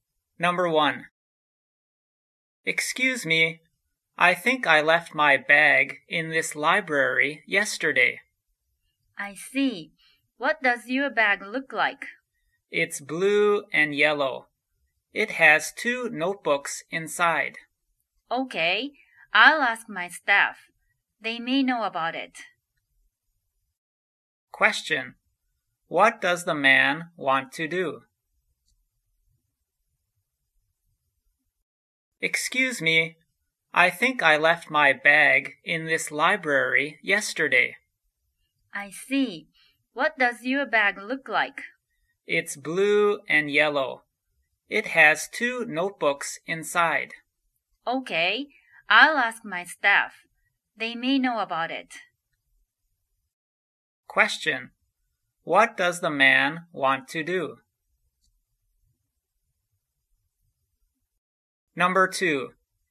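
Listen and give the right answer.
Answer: Find the bag he left in the library yesterday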